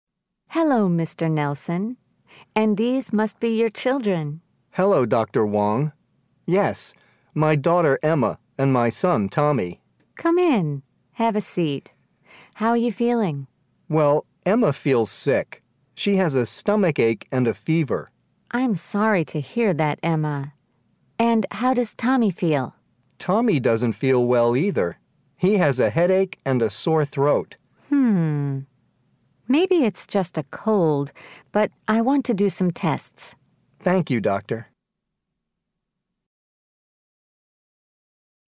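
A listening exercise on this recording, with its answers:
Listen. Then choose the correct answers.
The man is visiting the doctor because his mother are sick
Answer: False

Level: Eleventh Grade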